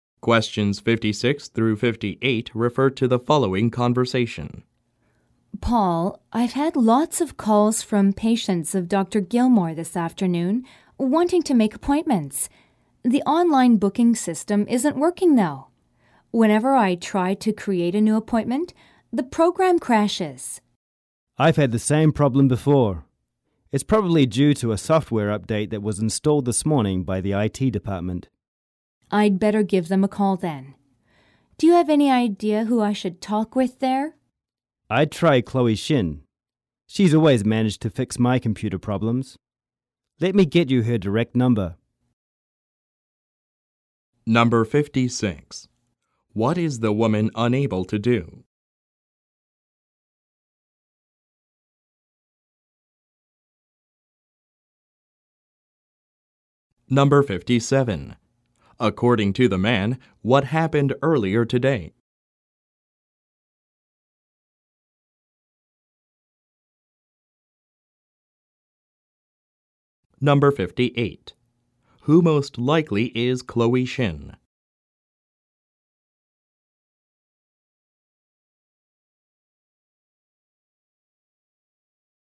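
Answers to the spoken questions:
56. Make new appointments in the online booking system
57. The IT department installed a software update
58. An IT department employee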